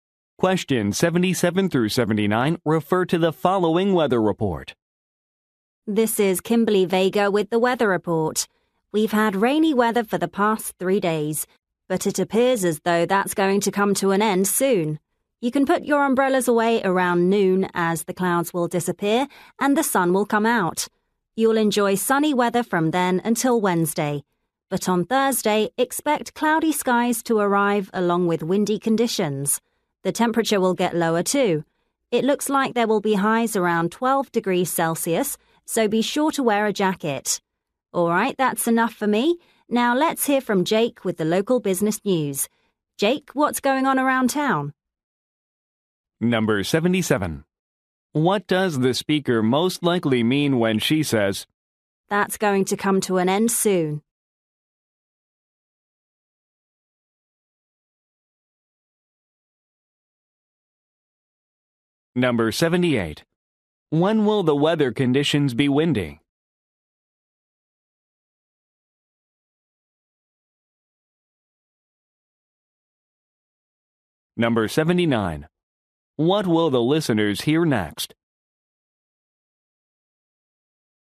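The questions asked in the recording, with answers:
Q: What does the speaker most likely mean when she says,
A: The rain will stop soon

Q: When will the weather conditions be windy?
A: On Thursday

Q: What will the listeners hear next?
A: Local business news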